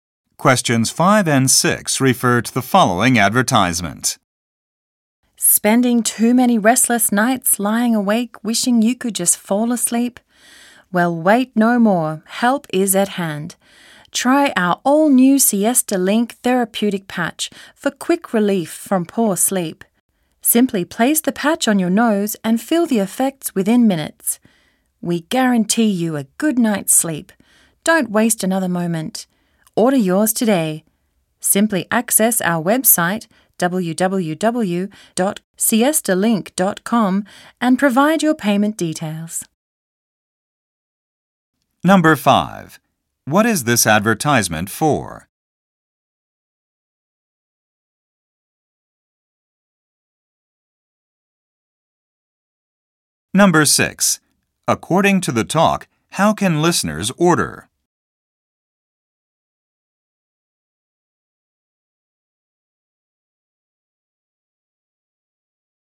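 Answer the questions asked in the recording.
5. A sleep aid patch
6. Through the website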